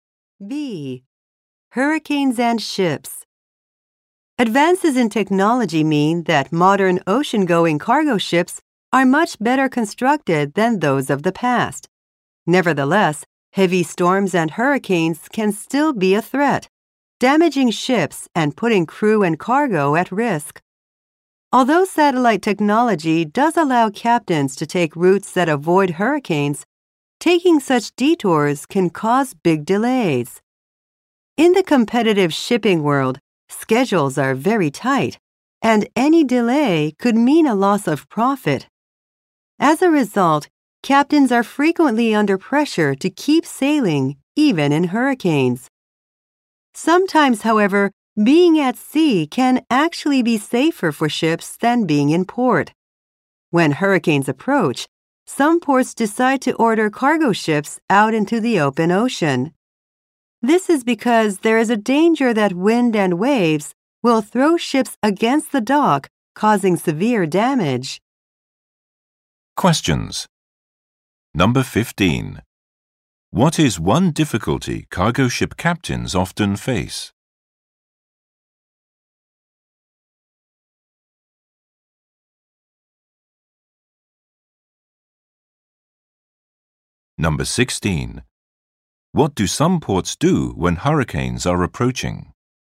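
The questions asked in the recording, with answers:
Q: What is one difficulty cargo ship captains often face?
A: They are under pressure to keep sailing, even in hurricanes, to avoid delays.

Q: What do some ports do when hurricanes are approaching?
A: They order cargo ships out into the open ocean.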